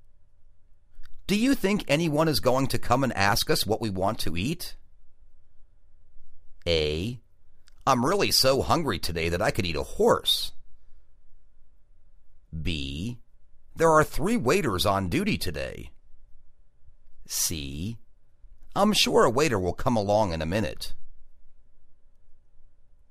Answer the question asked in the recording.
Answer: I'm sure a waiter will come along in a minute.